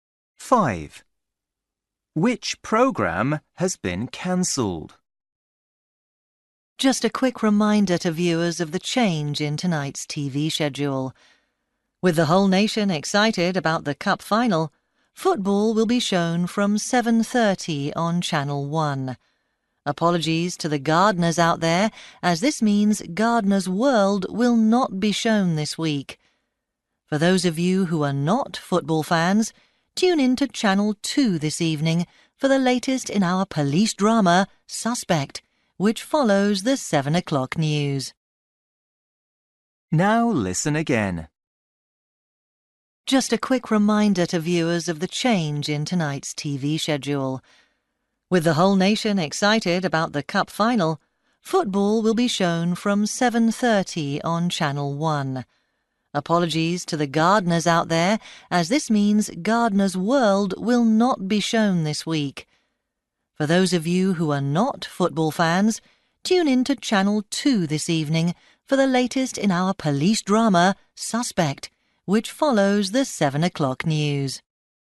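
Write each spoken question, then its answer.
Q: Which programme has been cancelled?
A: Gardener's World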